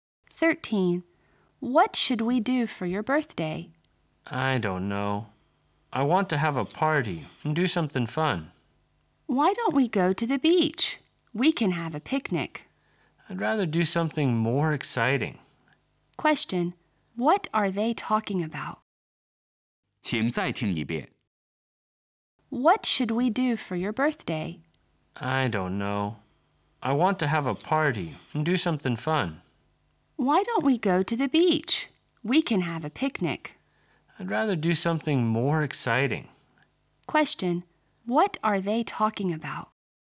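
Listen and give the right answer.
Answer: How to celebrate a birthday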